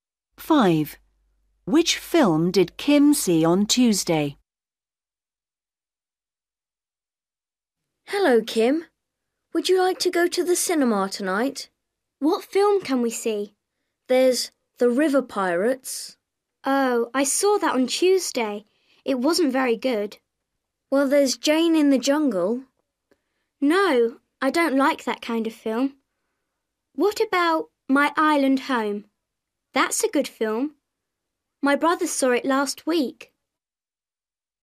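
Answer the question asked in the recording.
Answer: The River Pirates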